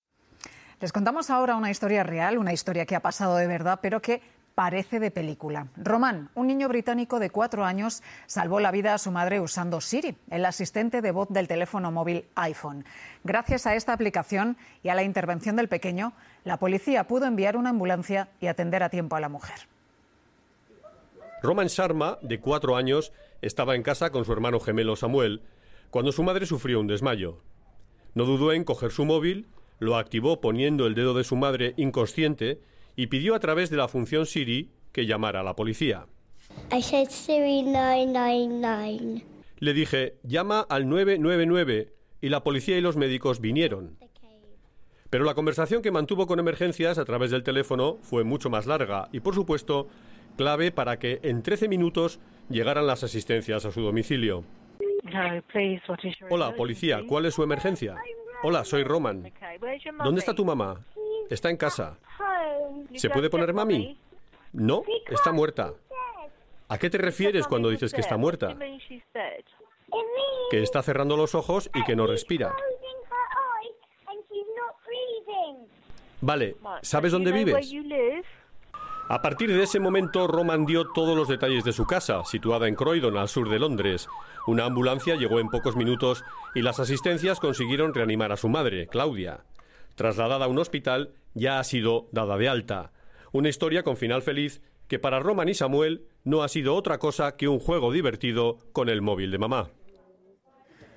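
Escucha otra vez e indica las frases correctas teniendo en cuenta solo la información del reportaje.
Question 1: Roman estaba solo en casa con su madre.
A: Falsa

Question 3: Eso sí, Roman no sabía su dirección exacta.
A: Falsa

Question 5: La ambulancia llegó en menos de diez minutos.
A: Falsa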